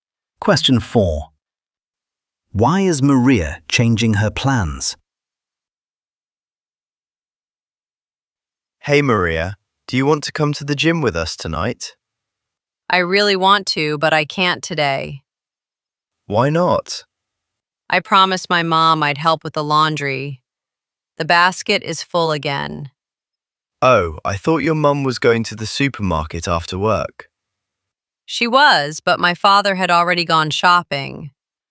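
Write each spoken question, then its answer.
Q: Why is Maria changing her plans?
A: she promised to help her mum with the laundry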